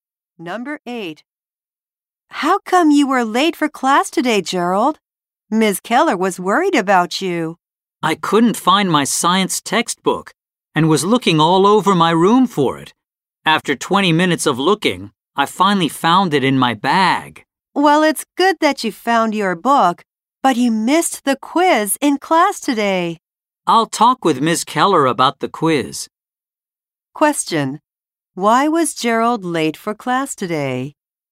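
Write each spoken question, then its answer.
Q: Why was Gerald late for class today?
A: He was looking for his science textbook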